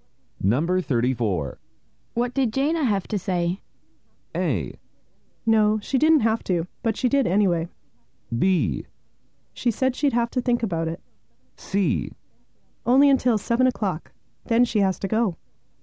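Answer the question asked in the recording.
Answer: B: She said she'd have to think about it.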